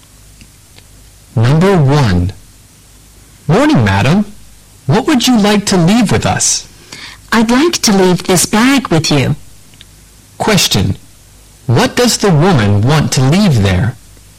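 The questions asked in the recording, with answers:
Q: What does the woman want to leave there?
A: A bag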